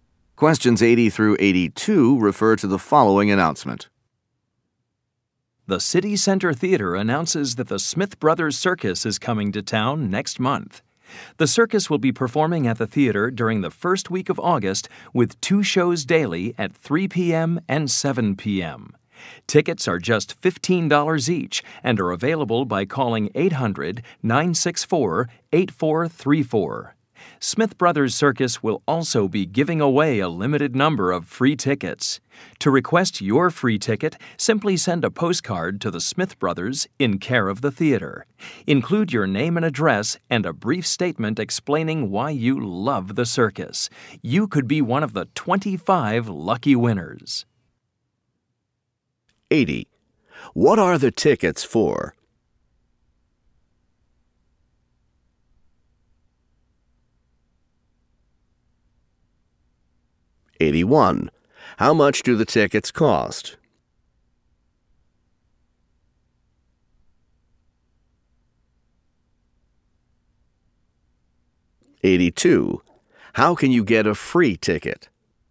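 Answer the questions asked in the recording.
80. The circus
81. $15 each
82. By sending a postcard to the theater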